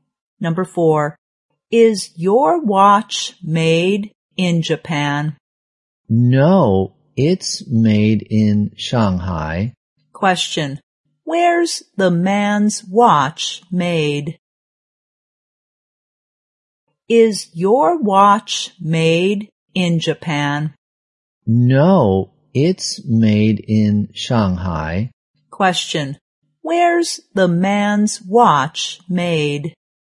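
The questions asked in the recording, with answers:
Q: where's the man's watch made?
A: In Shanghai.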